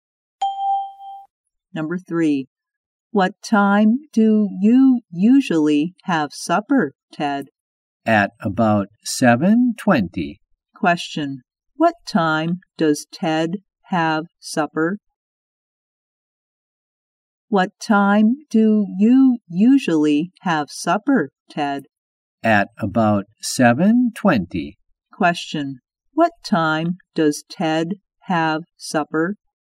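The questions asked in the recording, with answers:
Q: Question, what time does Ted have supper?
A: At about 7:20.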